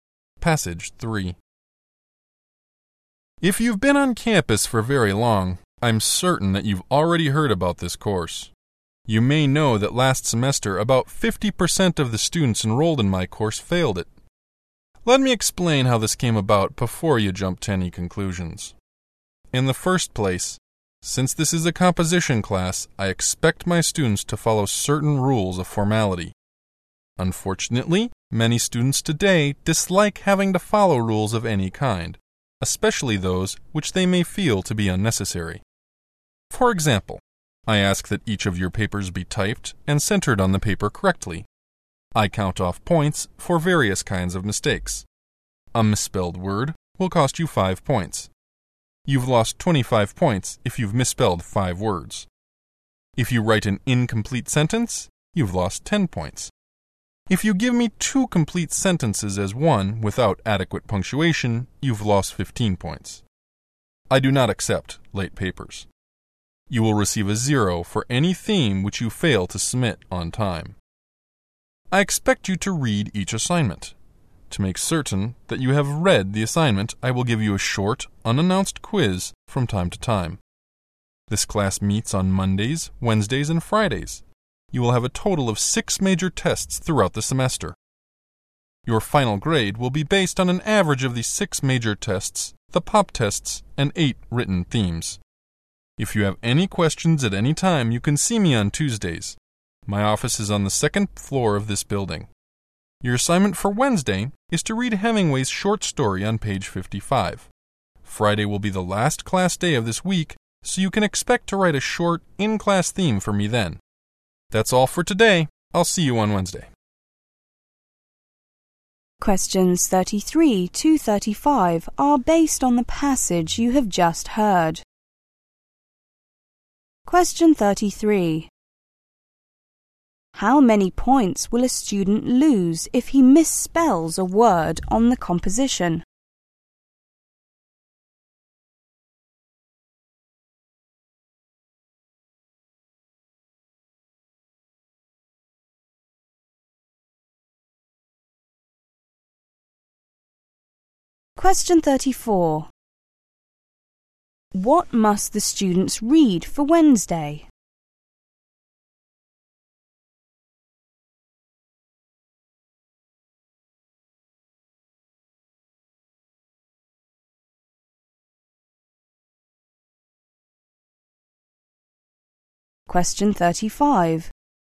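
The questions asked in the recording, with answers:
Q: How many points will a student lose if he misspells a word on the composition?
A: 5 points

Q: What must the students read for Wednesday?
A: Hemingway's short story on page 55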